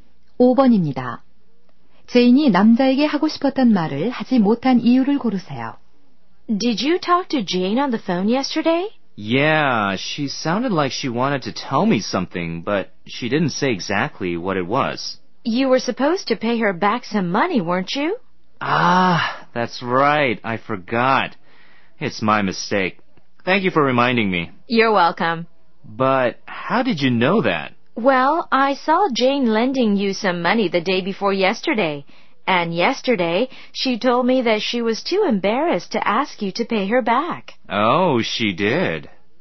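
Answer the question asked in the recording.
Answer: 빌려준 돈을 갚으라고 말하기가 너무 민망해서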